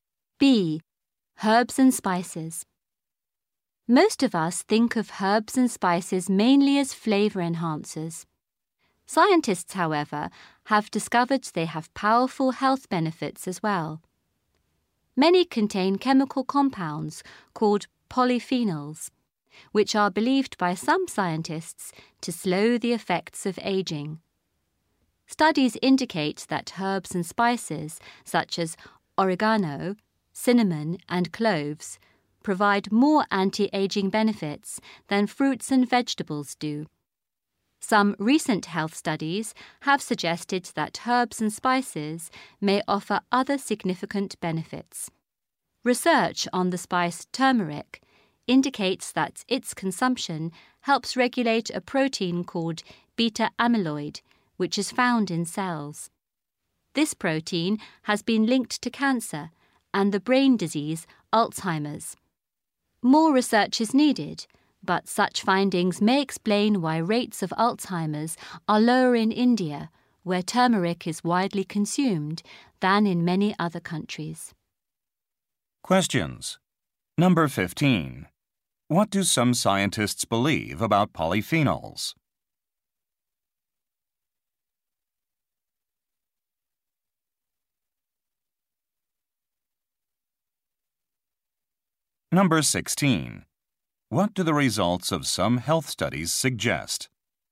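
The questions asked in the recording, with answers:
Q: What do some scientists believe about polyphenols?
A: They slow the effects of aging

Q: What do the results of some health studies suggest?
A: Turmeric may help protect against Alzheimer's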